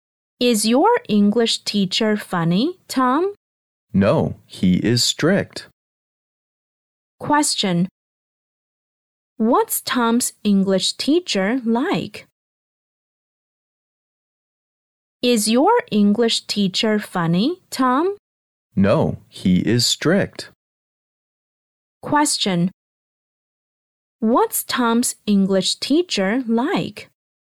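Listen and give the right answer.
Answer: He is strict.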